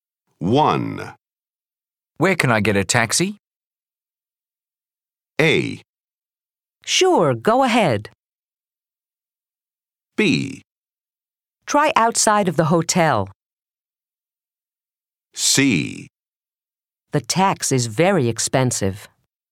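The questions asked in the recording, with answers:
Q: Where can I get a taxi?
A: B: Try outside of the hotel.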